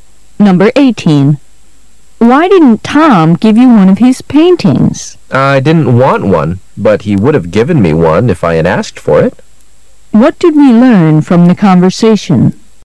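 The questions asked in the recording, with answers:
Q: What did we learn from the conversation?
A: The woman didn't ask Tom for a painting, though he would have given her one if she had.

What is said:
[解析] W: Why didn't Tom give you one of his paintings? M:I didn't want one,but he would have given me one if I had asked for it.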